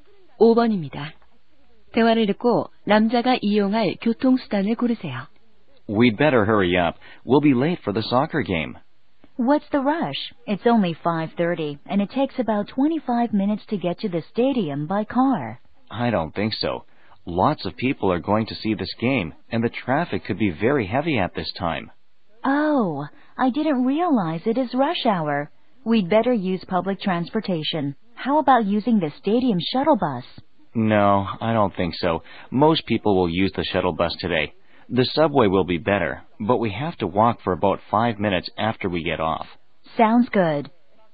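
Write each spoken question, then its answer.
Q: 대화를 듣고 남자가 이용할 교통수단을 고르세요.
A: 지하철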